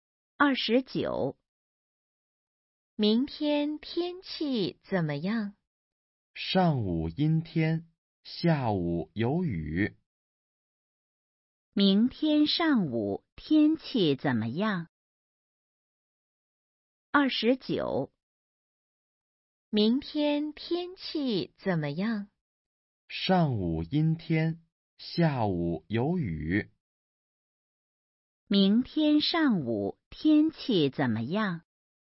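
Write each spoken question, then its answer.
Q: 明天上午天气怎么样?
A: 阴天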